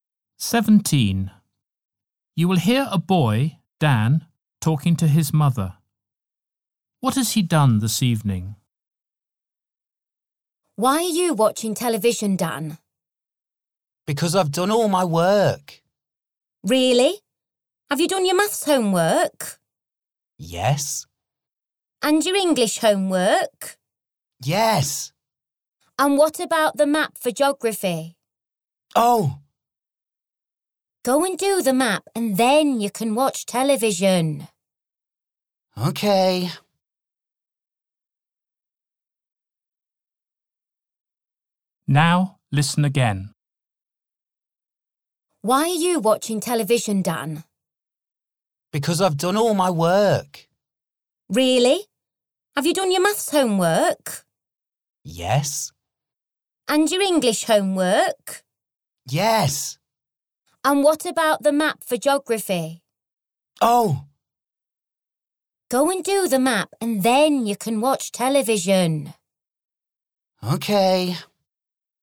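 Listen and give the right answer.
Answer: His maths and English homework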